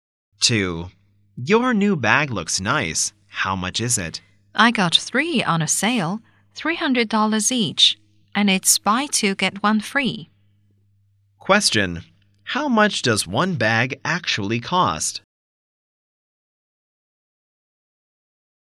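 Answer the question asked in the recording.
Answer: $200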